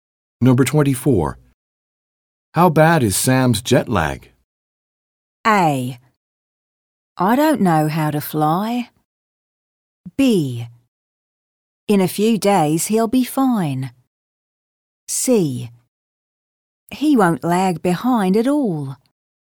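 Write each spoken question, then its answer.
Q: How bad is Sam's jet lag?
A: B: In a few days he'll be fine.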